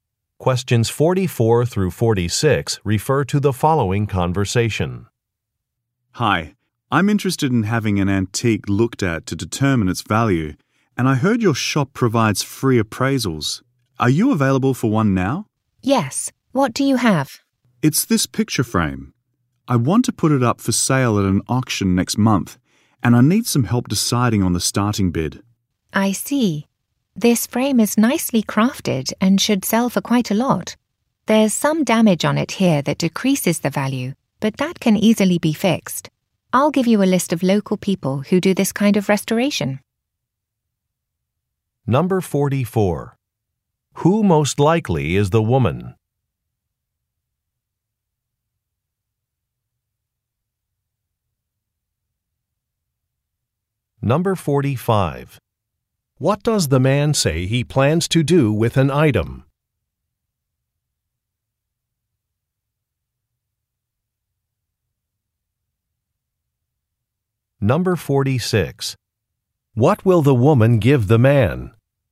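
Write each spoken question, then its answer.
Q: Who most likely is the woman?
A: An antique appraiser at a shop

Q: What does the man say he plans to do with an item?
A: Sell it at an auction next month

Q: What will the woman give the man?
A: A list of local people who do restoration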